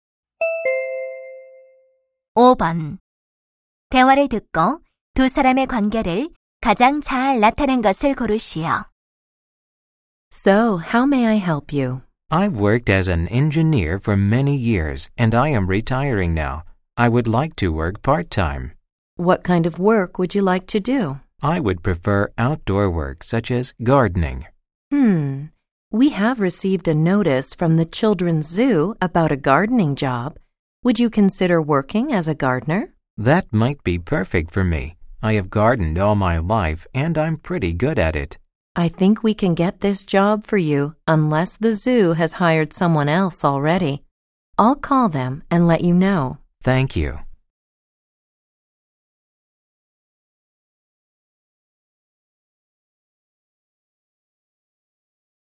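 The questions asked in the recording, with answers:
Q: 대화를 듣고 두 사람의 관계를 가장 잘 나타낸 것을 고르시오.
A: 직업 상담원과 구직자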